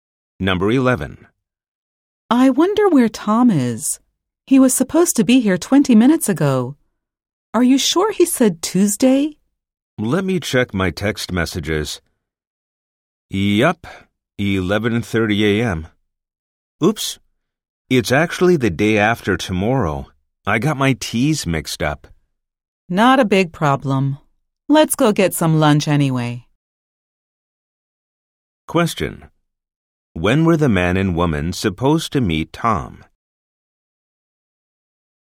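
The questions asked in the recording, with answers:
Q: When were the man and woman supposed to meet Tom?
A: The day after tomorrow at 11:30 a.m.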